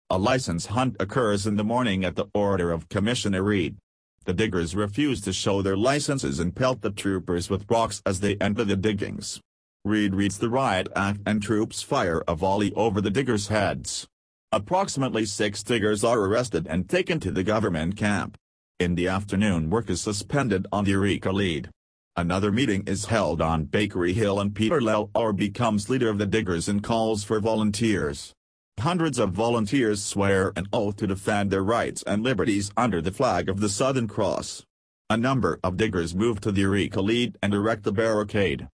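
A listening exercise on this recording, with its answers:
Listen the following audio and type missing words in each blank.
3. A Licence hunt occurs in the morning at the order of Commissioner Rede. The diggers refuse to show their Licences and _____ the troopers with rocks as they enter the diggings. Rede reads the Riot Act and ______ fire a volley over the diggers heads. Approximately six diggers are arrested and taken to the Government Camp. In the afternoon work is ______ on the Eureka Lead. Another meeting is held on Bakery Hill and Peter Lalor becomes leader of the diggers and calls for volunteers. Hundreds of volunteers swear an oath to defend their rights and _____ under the Flag of the Southern Cross. A number of diggers move to the Eureka Lead and ______ a barricade.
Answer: pelt; troops; suspended; liberties; erect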